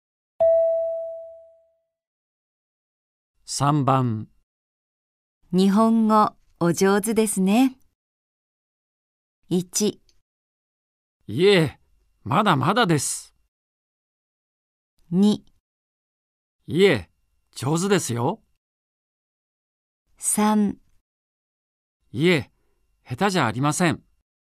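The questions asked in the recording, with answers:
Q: 日本語お上手ですね。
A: 1: いえ、まだまだです。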